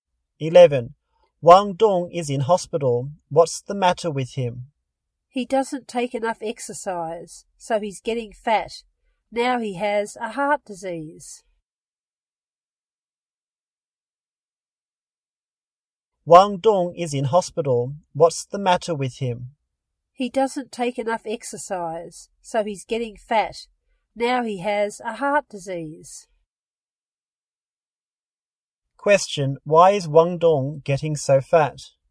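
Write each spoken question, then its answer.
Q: Why is Wang Dong getting so fat?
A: Because he doesn't take enough exercise.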